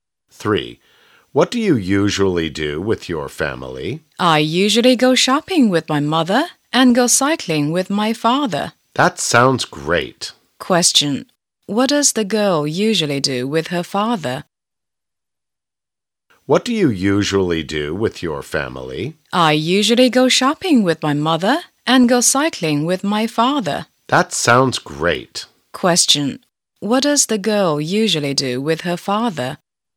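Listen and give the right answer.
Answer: She goes cycling.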